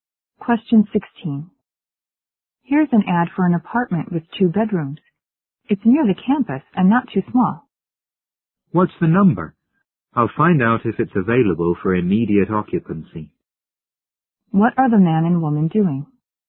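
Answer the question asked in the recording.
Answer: Looking for an apartment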